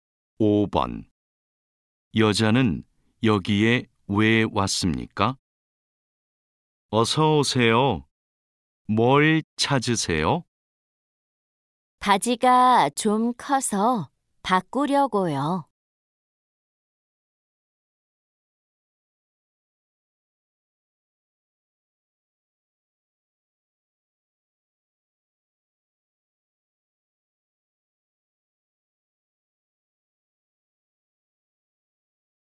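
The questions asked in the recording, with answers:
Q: 여자는 여기에 왜 왔습니까?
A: 바지가 커서 바꾸려고 왔습니다.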